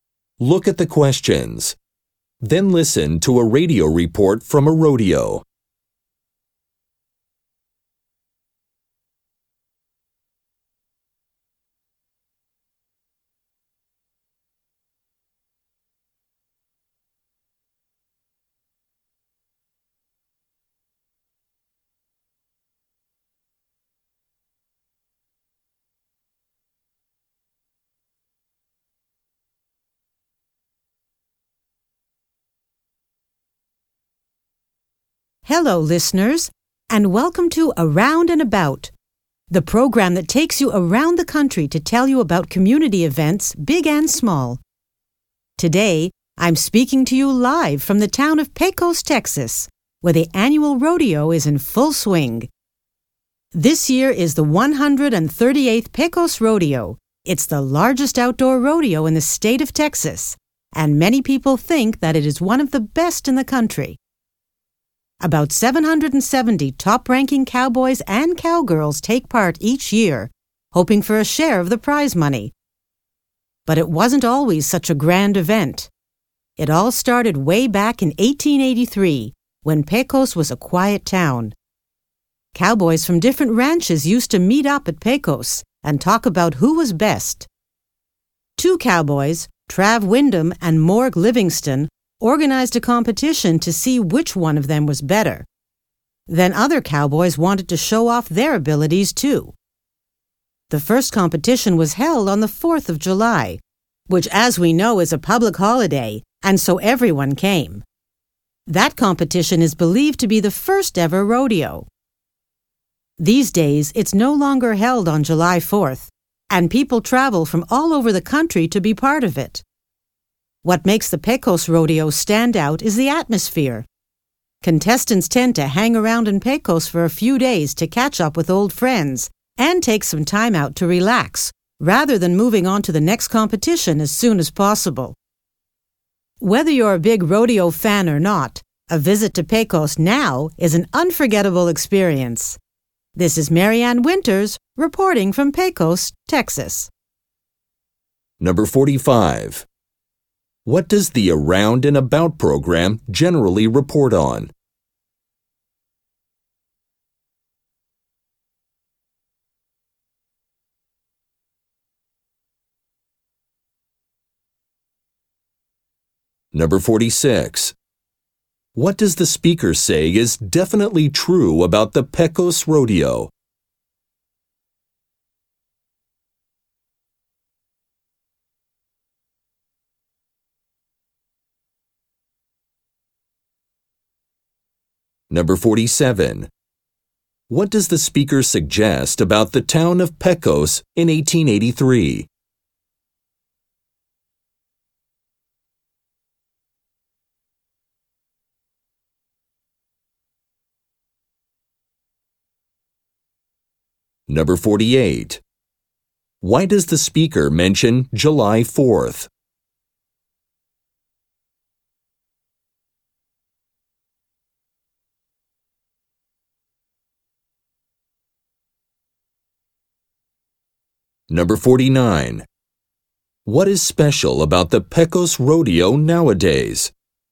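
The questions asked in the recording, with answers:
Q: What does the Around and About program generally report on?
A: Community events around the country

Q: What does the speaker say is definitely true about the Pecos Rodeo?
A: It is the largest outdoor rodeo in Texas

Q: What does the speaker suggest about the town of Pecos in 1883?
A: It was a quiet town

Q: Why does the speaker mention July 4th?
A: The first competition was held then, a public holiday, so everyone came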